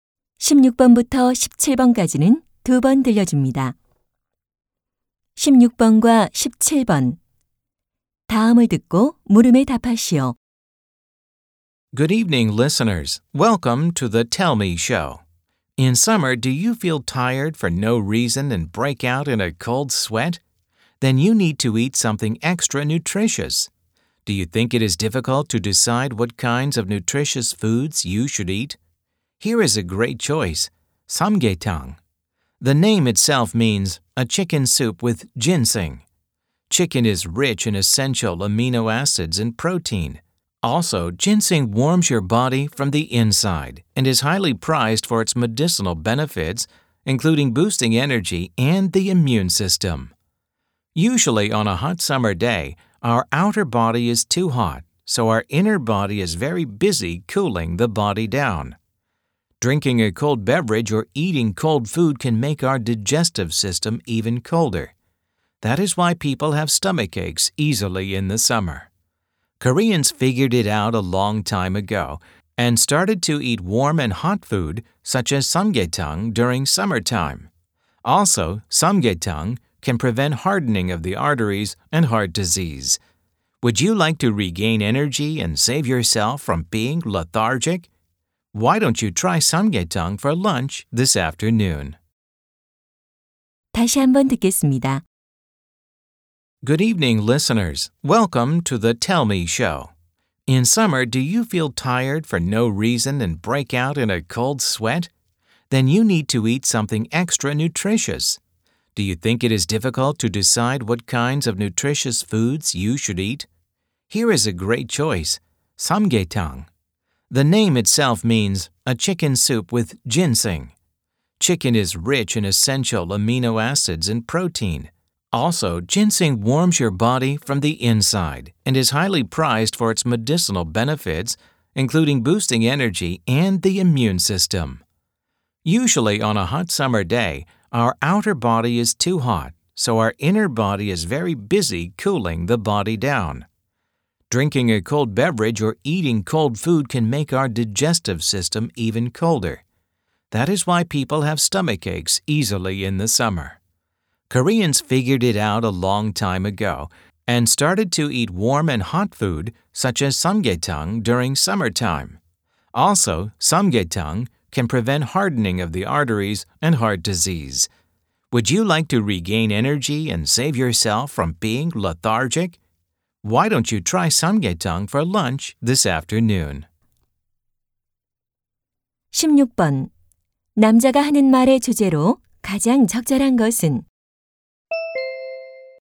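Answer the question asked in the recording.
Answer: 여름철 삼계탕의 건강상 이점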